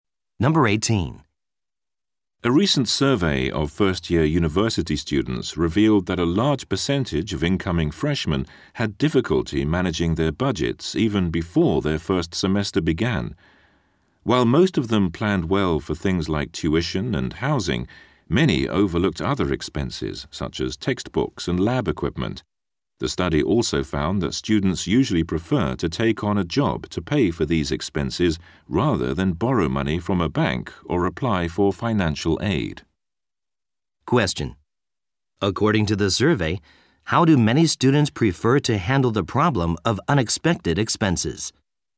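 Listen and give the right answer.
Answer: By getting a job.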